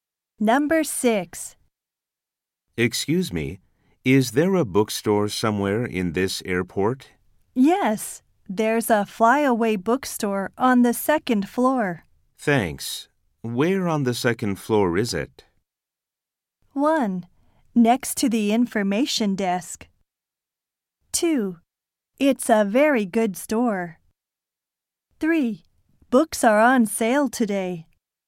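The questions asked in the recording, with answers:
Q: Thanks. Where on the second floor is it?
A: 1: Next to the information desk.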